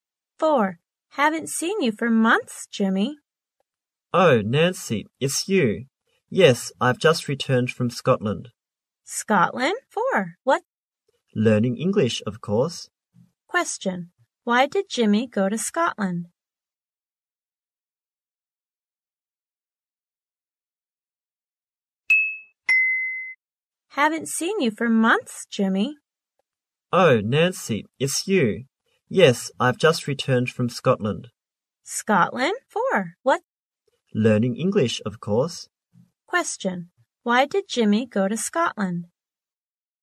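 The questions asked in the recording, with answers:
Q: Why did Jimmy go to Scotland?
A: To learn English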